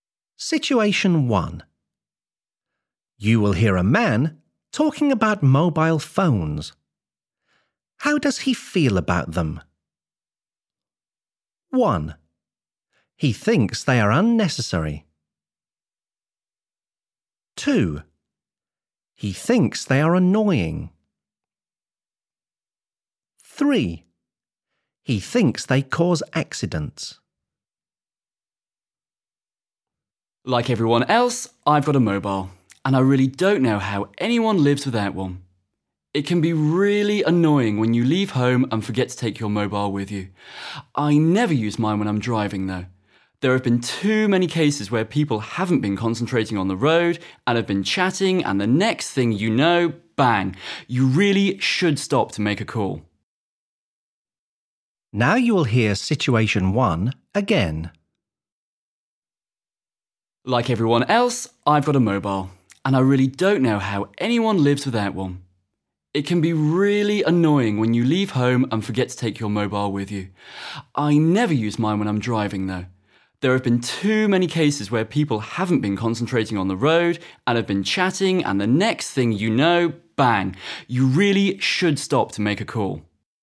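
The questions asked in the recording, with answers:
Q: How does he feel about them?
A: 3: He thinks they cause accidents.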